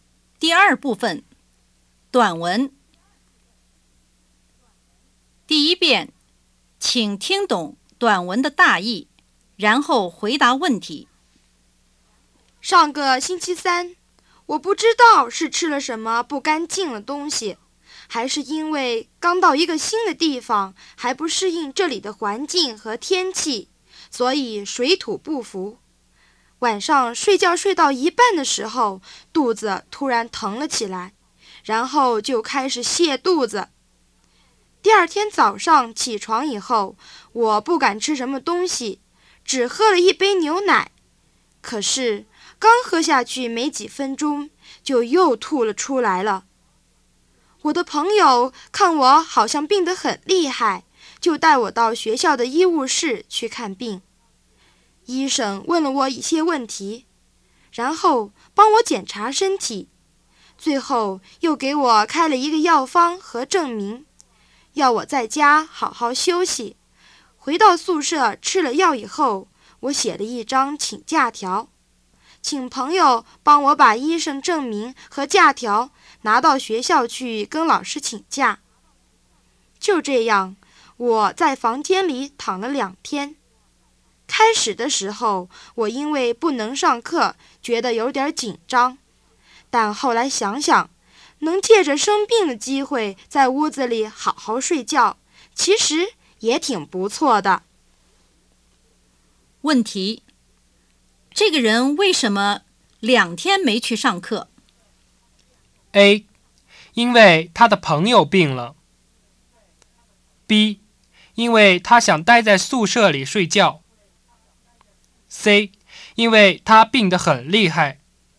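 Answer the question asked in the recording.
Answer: C: 因为他病得很厉害。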